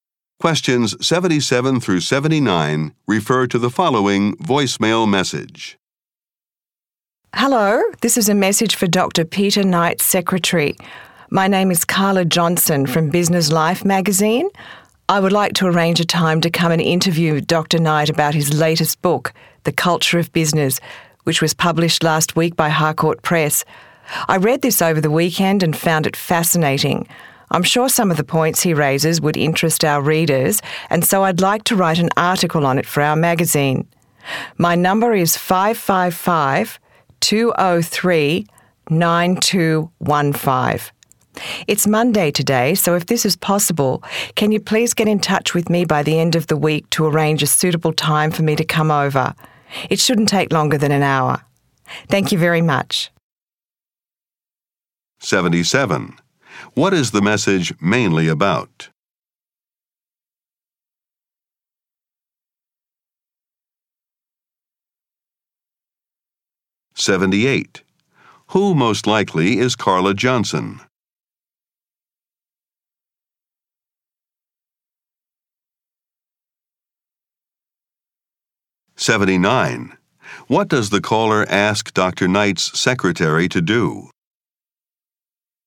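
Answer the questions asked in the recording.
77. Arranging an interview with Dr. Knight about his new book
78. A magazine journalist
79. Call her back by the end of the week to arrange a time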